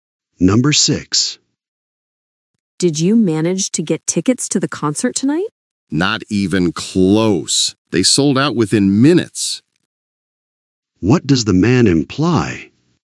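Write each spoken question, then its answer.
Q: What does the man imply?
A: He didn't get tickets; they sold out.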